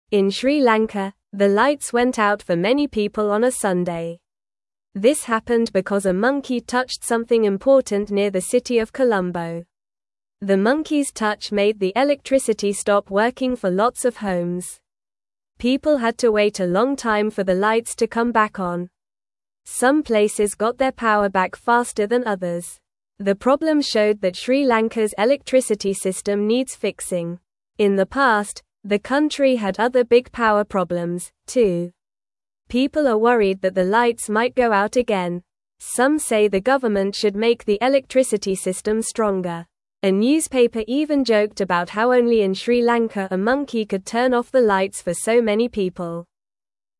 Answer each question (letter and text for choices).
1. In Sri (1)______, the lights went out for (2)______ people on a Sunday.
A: Lanka

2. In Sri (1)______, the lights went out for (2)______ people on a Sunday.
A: many

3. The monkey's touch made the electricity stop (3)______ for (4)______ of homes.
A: working

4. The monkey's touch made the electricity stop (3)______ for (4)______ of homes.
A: lots

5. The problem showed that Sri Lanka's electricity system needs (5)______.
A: fixing

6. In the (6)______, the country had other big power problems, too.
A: past

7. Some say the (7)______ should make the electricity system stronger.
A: government

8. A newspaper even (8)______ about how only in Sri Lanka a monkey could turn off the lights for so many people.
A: joked

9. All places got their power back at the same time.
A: False

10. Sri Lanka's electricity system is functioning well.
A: False

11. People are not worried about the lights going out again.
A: False

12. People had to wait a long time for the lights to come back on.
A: True

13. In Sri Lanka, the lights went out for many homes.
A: True

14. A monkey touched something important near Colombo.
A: True

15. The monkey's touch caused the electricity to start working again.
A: False

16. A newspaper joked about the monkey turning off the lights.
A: True

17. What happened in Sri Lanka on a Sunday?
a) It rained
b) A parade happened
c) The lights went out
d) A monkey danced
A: c) The lights went out

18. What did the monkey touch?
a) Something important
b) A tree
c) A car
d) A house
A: a) Something important

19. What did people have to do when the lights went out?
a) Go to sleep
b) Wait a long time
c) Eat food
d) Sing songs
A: b) Wait a long time

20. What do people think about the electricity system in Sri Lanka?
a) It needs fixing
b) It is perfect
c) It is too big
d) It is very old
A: a) It needs fixing

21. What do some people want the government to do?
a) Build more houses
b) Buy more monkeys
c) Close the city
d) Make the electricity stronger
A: d) Make the electricity stronger

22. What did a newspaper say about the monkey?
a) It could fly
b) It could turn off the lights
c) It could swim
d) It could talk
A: b) It could turn off the lights

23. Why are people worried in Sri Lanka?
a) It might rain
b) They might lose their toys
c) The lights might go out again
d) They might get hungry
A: c) The lights might go out again

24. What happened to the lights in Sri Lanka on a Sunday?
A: The lights went out for many people.

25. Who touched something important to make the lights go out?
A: A monkey touched something important.

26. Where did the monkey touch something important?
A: Near the city of Colombo.

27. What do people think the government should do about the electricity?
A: People think the government should make the electricity system stronger.

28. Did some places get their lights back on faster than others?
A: Yes, some places got their lights back on faster than others.

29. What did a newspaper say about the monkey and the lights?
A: The newspaper joked that only in Sri Lanka a monkey could turn off the lights for so many people.

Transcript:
In Sri Lanka, the lights went out for many people on a Sunday. This happened because a monkey touched something important near the city of Colombo. The monkey's touch made the electricity stop working for lots of homes. Some places got their power back faster than others.
The problem showed that Sri Lanka's electricity system needs fixing. In the past, the country had other big power problems, too. People are worried that the lights might go out again. Some say the government should make the electricity system stronger. A newspaper even joked about how only in Sri Lanka a monkey could turn off the lights for so many people.

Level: Level 1